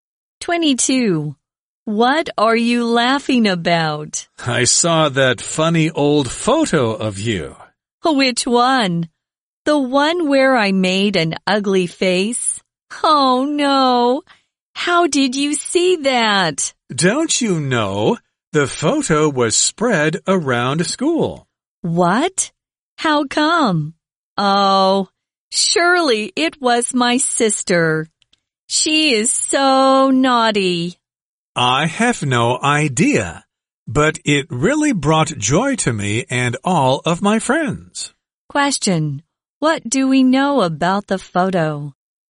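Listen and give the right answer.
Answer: It was spread around the school.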